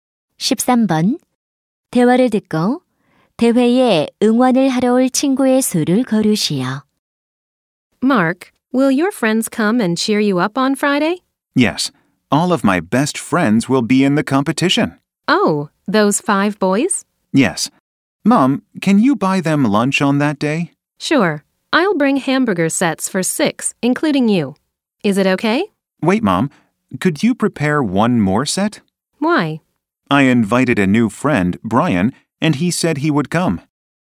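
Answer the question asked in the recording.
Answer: 6명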